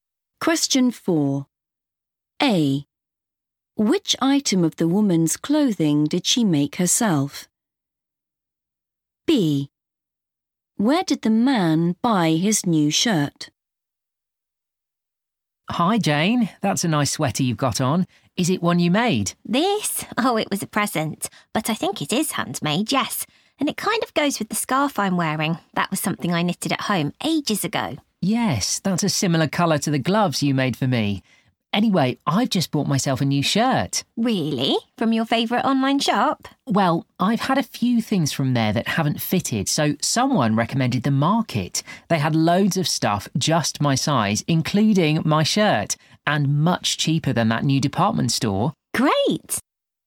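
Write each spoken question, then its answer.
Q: Which item of the woman's clothing did she make herself?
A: scarf

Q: Where did the man buy his new shirt?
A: The Market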